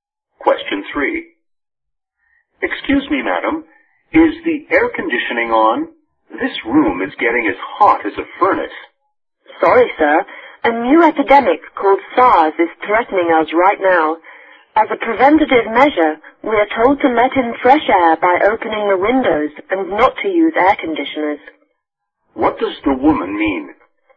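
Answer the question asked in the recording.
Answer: The air conditioning is off to help prevent SARS, so they open the windows instead.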